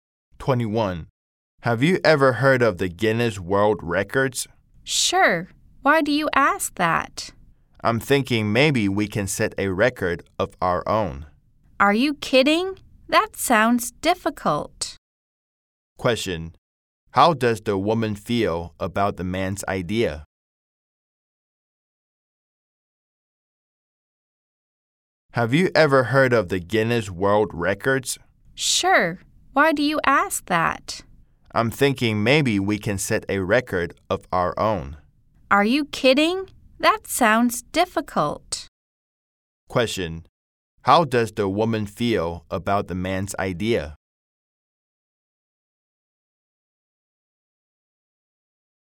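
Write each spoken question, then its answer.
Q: How does the woman feel about the man's idea?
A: She thinks it sounds difficult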